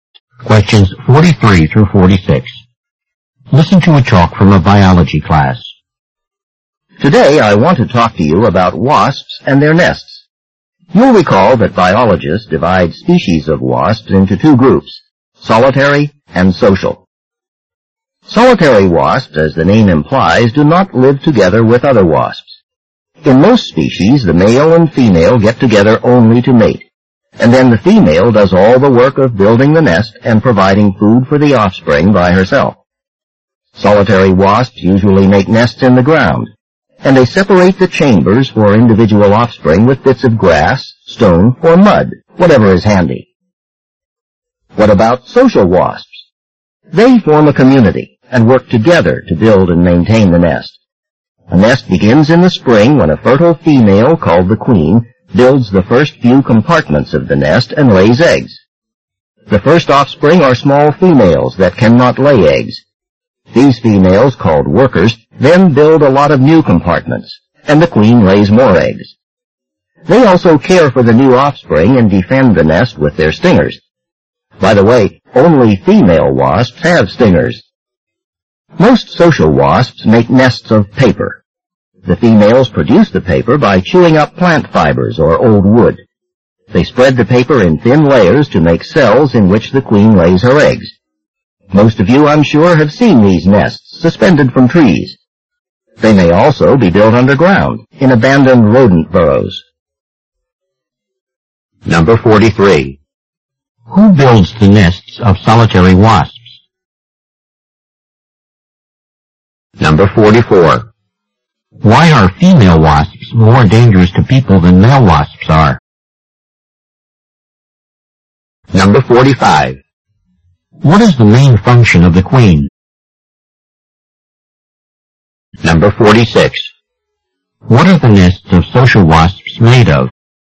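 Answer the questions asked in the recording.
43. The female
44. Only females have stingers
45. To lay eggs
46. Paper made from chewed plant fibers or wood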